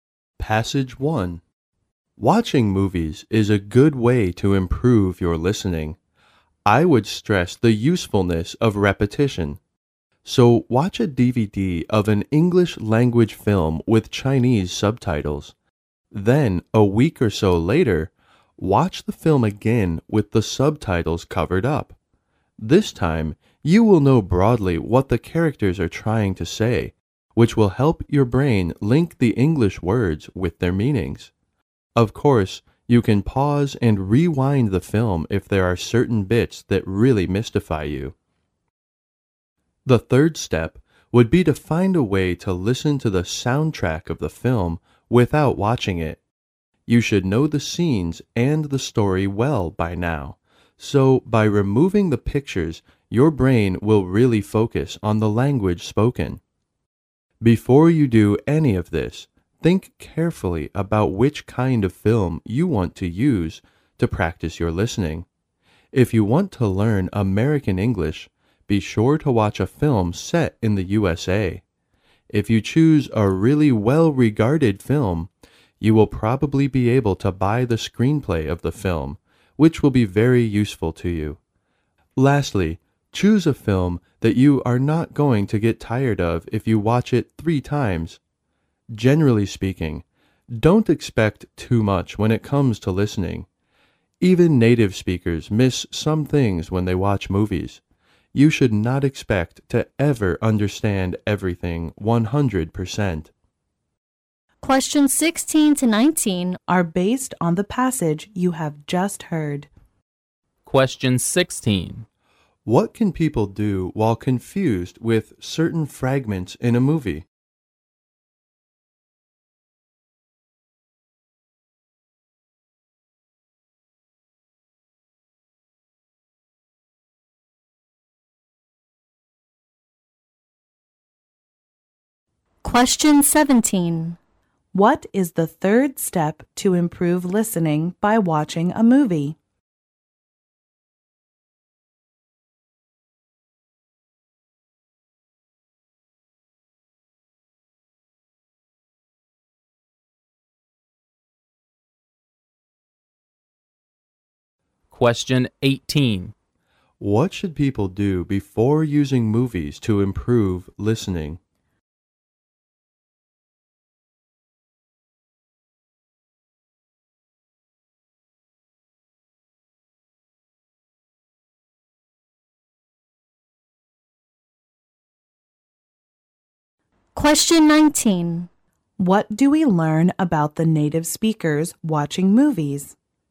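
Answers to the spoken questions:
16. Pause and rewind the film
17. Listen to the soundtrack without watching
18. Think carefully about which film to use
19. They also miss some things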